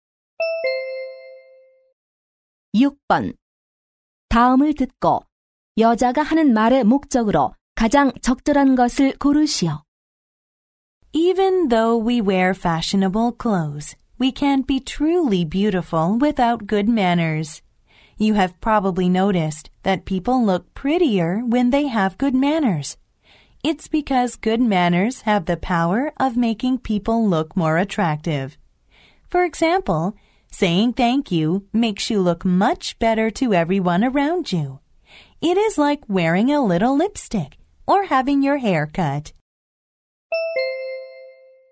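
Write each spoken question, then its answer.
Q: 다음을 듣고 여자가 하는 말의 목적으로 가장 적절한 것을 고르시오.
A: 좋은 예절의 중요성 강조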